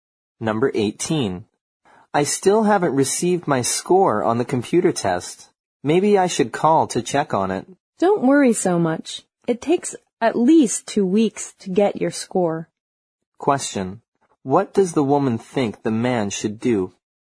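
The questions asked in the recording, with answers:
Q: What does the woman think the man should do?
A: Not worry and wait for the score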